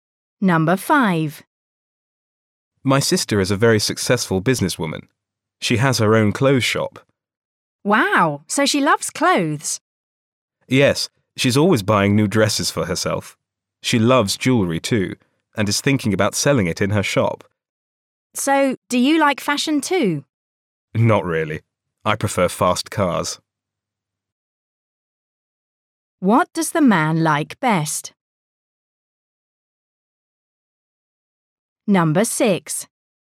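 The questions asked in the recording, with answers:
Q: What does the man like best?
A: Fast cars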